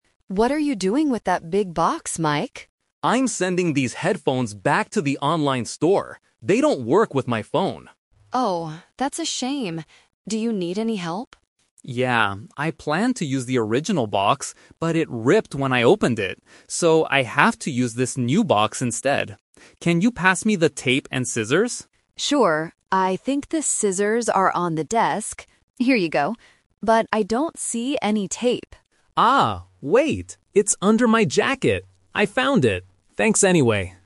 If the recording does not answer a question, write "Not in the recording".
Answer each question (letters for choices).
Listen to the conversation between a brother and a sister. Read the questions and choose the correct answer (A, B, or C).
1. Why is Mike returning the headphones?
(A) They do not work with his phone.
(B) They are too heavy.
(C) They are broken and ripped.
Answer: A

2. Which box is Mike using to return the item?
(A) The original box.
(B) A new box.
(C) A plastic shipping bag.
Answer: B

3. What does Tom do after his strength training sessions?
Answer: Not in the recording

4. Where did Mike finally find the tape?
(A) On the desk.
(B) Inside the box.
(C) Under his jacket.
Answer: C

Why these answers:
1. Mike explicitly says, "They don't work with my phone." Why the trap is wrong: Option (C) is a trap. He mentions the word "ripped", but it was the box that ripped, not the headphones. Option (B) is not mentioned.
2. Mike says, "I have to use this new box instead." Why the trap is wrong: Option (A) is the "Twist" trap. He "planned to use the original box", but he couldn't because it was damaged.
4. At the end of the conversation, Mike says the tape is "under my jacket." Why the trap is wrong: Option (A) is a trap. Anna found the scissors on the desk, not the tape. Option (B) is not mentioned.

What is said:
Anna: What are you doing with that big box, Mike?
Mike: I'm sending these headphones back to the online store. They don't work with my phone.
Anna: Oh, that's a shame. Do you need any help?
Mike: Yeah. I planned to use the original box, but it ripped when I opened it. So, I have to use this new box instead. Can you pass me the tape and scissors?
Anna: Sure. I think the scissors are on the desk... Here you go. But I don't see any tape.
Mike: Ah, wait. It's under my jacket! I found it. Thanks anyway.